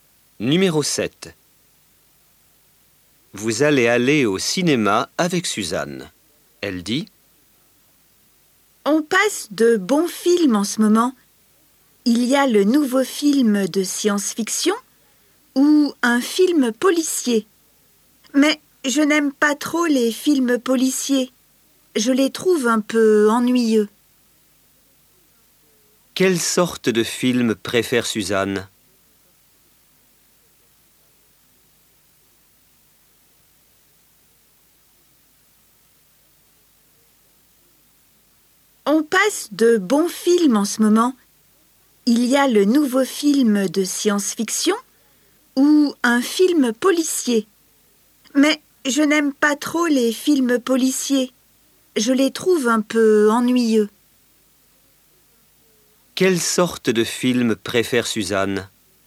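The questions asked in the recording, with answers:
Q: Quelle sorte de film préfère Suzanne?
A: Les films de science-fiction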